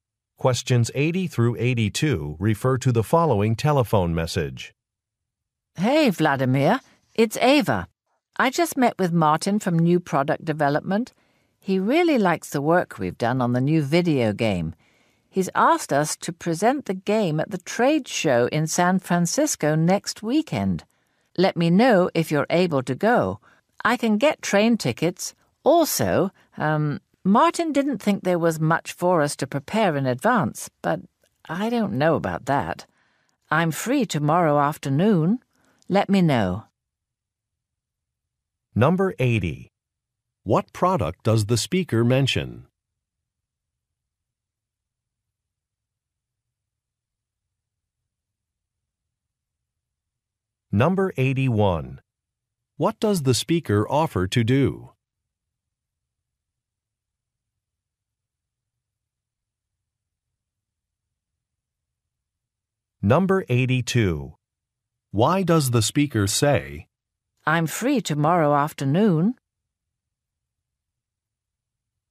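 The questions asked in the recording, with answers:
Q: What product does the speaker mention?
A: A video game

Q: What does the speaker offer to do?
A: Get train tickets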